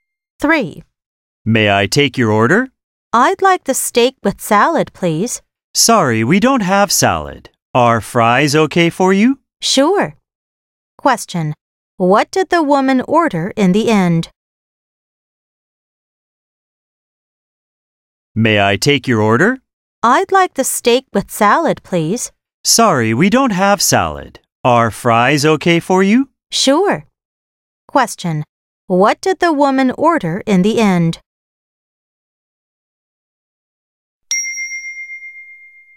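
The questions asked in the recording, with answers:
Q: What did the woman order in the end?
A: steak with fries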